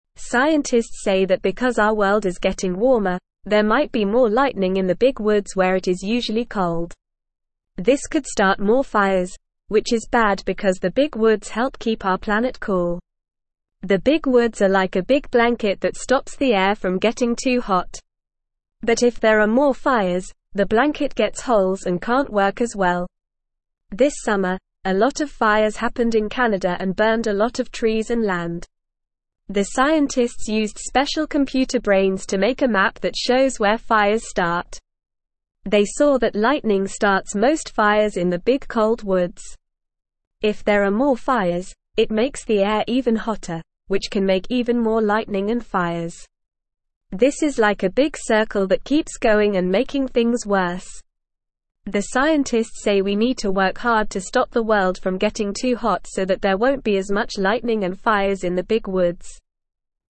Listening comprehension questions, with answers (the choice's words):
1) Scientists say that because our world is (1)______ warmer, there might be more lightning in the big woods where it is usually cold.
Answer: getting

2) This could start more fires, which is bad because the big woods help keep our planet (2)______.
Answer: cool

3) But if there are more fires, the blanket gets (3)______ and can't work as well.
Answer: holes

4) This summer, a lot of fires happened in Canada and burned a lot of trees and (4)______.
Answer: land

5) They saw that lightning starts most fires in the big cold (5)______.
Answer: woods

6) If there are more fires, it makes the air even (6)______, which can make even more lightning and fires.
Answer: hotter

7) The scientists say we need to (7)______ hard to stop the world from getting too hot so that there won't be as much (8)______ and fires in the big woods.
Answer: work

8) The scientists say we need to (7)______ hard to stop the world from getting too hot so that there won't be as much (8)______ and fires in the big woods.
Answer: lightning

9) Why are scientists worried about more lightning in the big woods?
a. It could make the air smell bad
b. It could make the trees grow faster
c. It could start more fires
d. It could make the animals run away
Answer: It could start more fires

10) What do the big woods help keep our planet?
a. Cool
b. Warm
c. Wet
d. Dry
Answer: Cool

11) What did the scientists use to make a map that shows where fires start?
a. Special pencils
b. Special books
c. Special toys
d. Special computer brains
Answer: Special computer brains

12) What starts most fires in the big cold woods?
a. Rain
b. Snow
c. Wind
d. Lightning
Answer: Lightning

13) What happens if there are more fires in the big woods?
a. The air gets cooler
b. The air gets even hotter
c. The animals have more fun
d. The trees grow taller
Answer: The air gets even hotter

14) What can make even more lightning and fires?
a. The air getting colder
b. The air getting hotter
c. The rain falling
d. The wind blowing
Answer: The air getting hotter

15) What do the scientists say we need to work hard to stop?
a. The world from getting too hot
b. The world from getting too cold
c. The world from getting too wet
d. The world from getting too dry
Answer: The world from getting too hot

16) What is the big woods compared to in the article?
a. A big hat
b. A big shoe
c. A big blanket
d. A big book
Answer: A big blanket

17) Scientists used regular computer brains to make a map that shows where fires start.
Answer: False

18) More fires in the big woods can make the blanket of trees get holes and not work as well.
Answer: True

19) Lightning starts few fires in the big warm woods, which can make the air even cooler.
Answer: False

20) Lightning cannot start fires in the big woods, which is good because the woods help keep the planet cool.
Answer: False

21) The big woods are like a big blanket that stops the air from getting too hot.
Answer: True

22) The world is getting cooler, and this might cause less lightning in the warm big fields.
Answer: False

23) Many fires happened in Canada this summer and burned a lot of trees and land.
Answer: True

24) What is happening to our world that might make more lightning?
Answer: Our world is getting warmer, and that can make more lightning.

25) Where might there be more lightning because our world is getting warmer?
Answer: There might be more lightning in the big woods where it is usually cold.

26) Why are fires in the big woods bad for our planet?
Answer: Fires in the big woods are bad because the woods help stop the air from getting too hot, and fires make holes in this blanket.

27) What do the big woods do for the air?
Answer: The big woods are like a big blanket that stops the air from getting too hot.

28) What happened this summer in Canada?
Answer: This summer in Canada, a lot of fires happened and burned many trees and land.

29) How did the scientists find out where fires start?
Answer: Scientists used special computer brains to make a map that shows where fires start.

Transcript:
Scientists say that because our world is getting warmer, there might be more lightning in the big woods where it is usually cold. This could start more fires, which is bad because the big woods help keep our planet cool. But if there are more fires, the blanket gets holes and can't work as well. This summer, a lot of fires happened in Canada and burned a lot of trees and land.
The scientists used special computer brains to make a map that shows where fires start. They saw that lightning starts most fires in the big cold woods. If there are more fires, it makes the air even hotter, which can make even more lightning and fires. This is like a big circle that keeps going and making things worse. The scientists say we need to work hard to stop the world from getting too hot so that there won't be as much lightning and fires in the big woods.

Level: Level 1